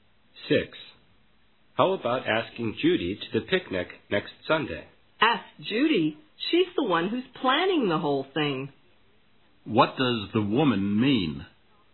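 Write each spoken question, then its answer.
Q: What does the woman mean?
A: Judy is already going; she is organizing the picnic.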